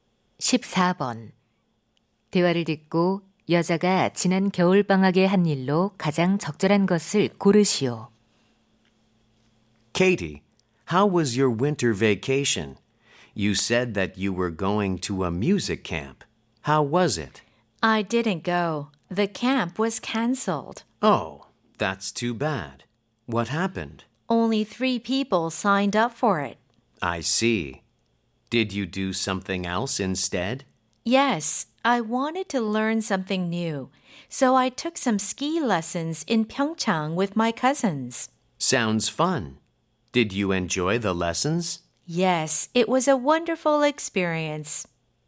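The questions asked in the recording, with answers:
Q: 대화를 듣고 여자가 지난 겨울방학에 한 일로 가장 적절한 것을 고르시오.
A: 평창에서 스키 강습 받기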